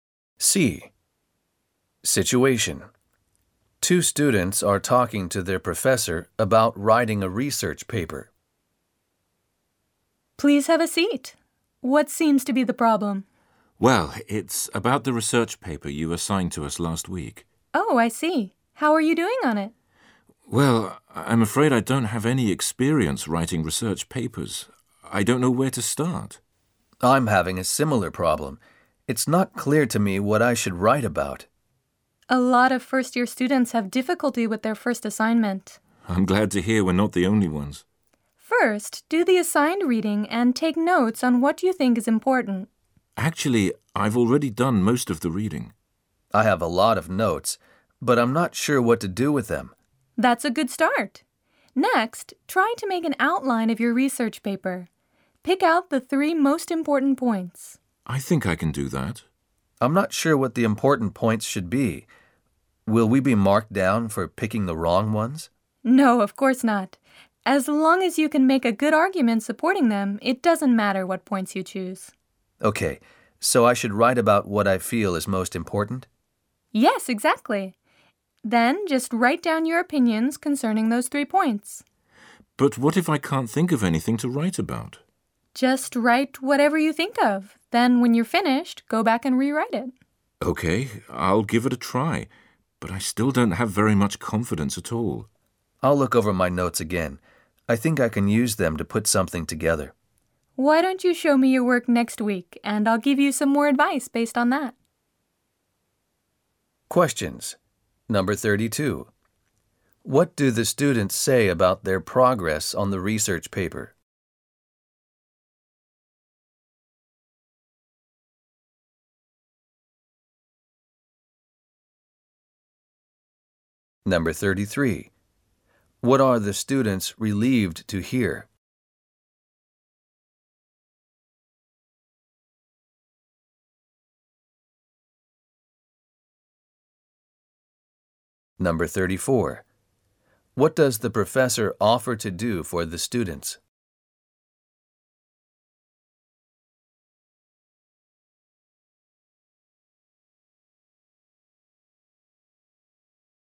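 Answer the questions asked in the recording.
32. They don't know where to start or what to write about
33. Many first-year students have difficulty with their first assignment
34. Look at their work next week and give more advice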